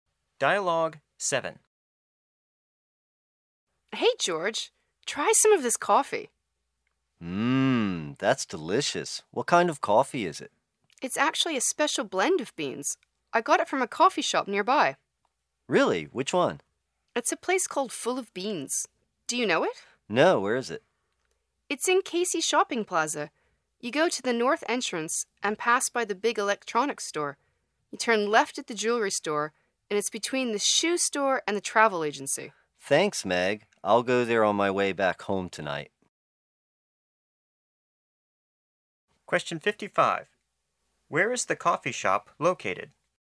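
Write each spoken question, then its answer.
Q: Where is the coffee shop located?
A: In Casey Shopping Plaza, between the shoe store and the travel agency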